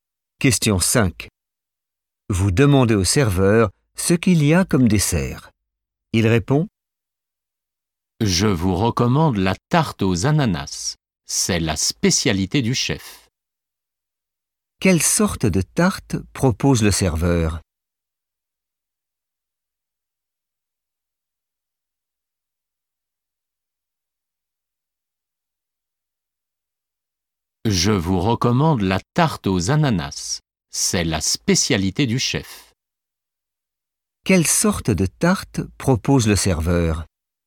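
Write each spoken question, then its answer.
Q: Quelle sorte de tarte propose le serveur?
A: une tarte aux ananas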